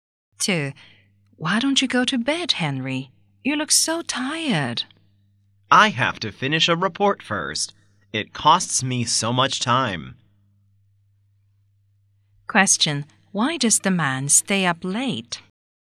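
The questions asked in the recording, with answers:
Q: Why does the man stay up late?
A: He has to finish a report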